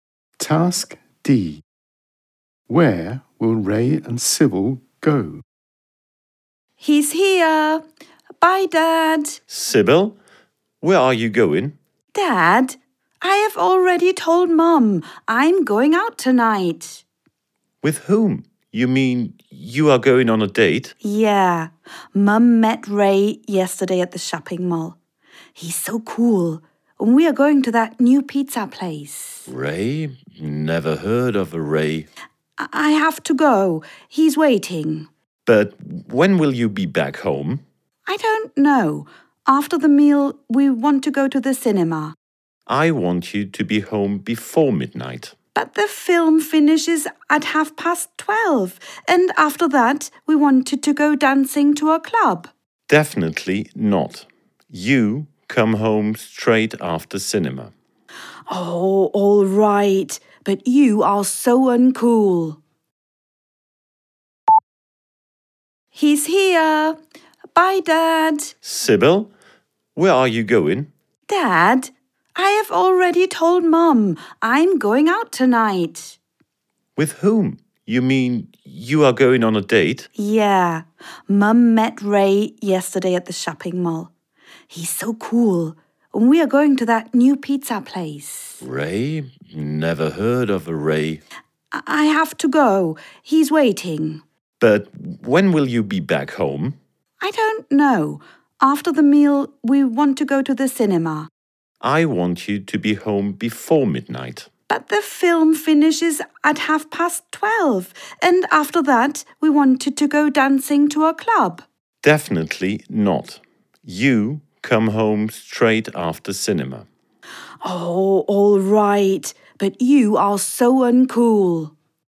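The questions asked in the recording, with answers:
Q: Where will Ray and Sybil go?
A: To the new pizza place and then the cinema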